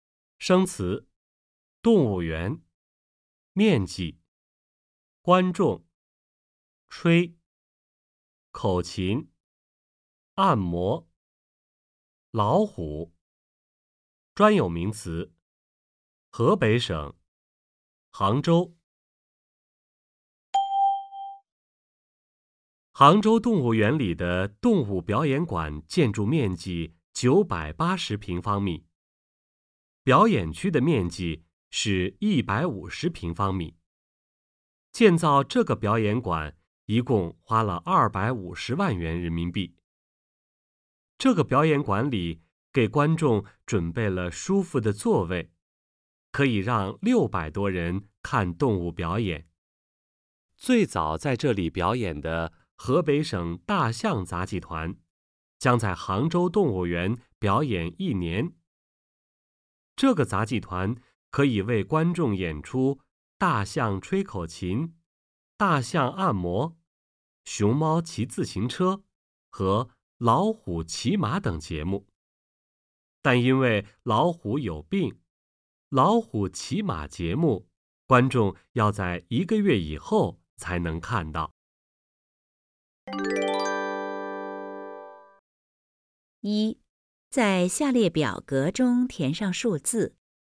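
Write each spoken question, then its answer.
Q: 最早要在这个表演馆表演的动物有哪些?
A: 大象、熊猫和老虎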